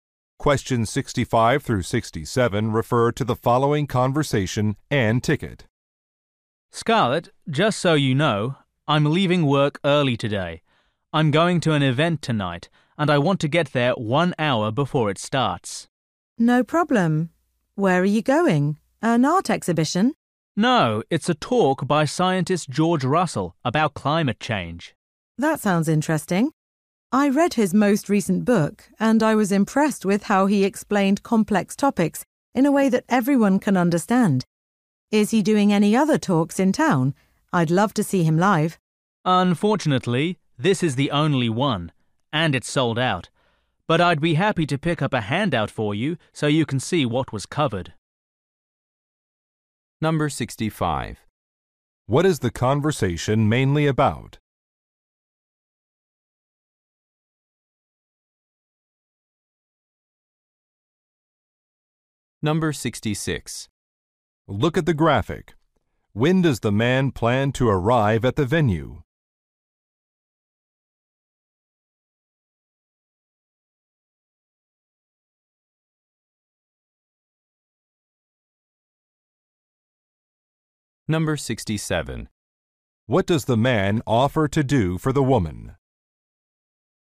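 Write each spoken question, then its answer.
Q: What is the conversation mainly about?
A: A talk by scientist George Russell

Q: What does the man offer to do for the woman?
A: Pick up a handout for her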